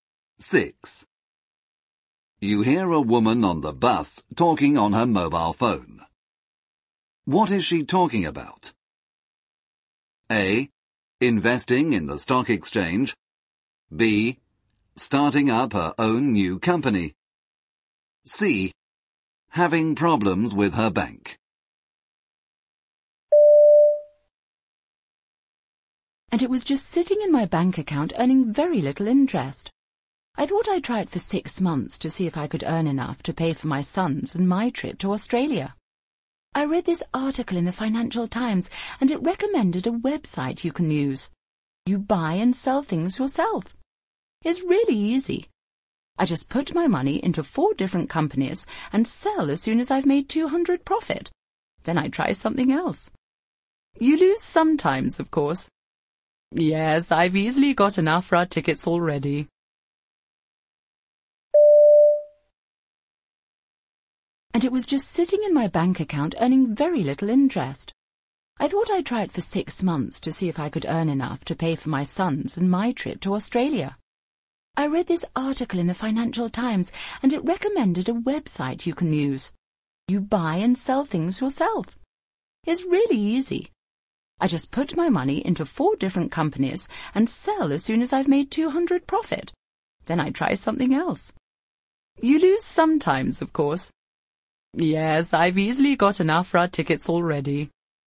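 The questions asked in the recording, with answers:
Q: What is she talking about?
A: A: Investing in the stock exchange.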